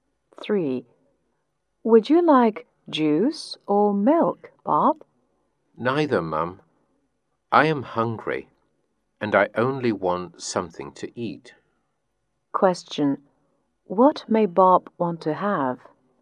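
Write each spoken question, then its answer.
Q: What may Bob want to have?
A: Something to eat.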